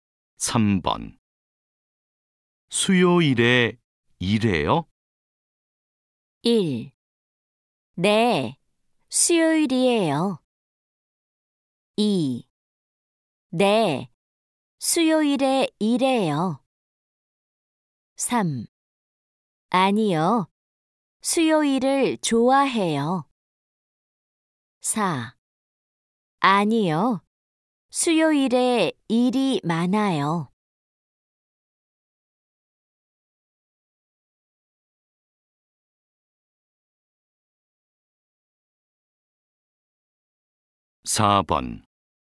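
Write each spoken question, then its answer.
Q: 수요일에 일해요?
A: 2: 네, 수요일에 일해요.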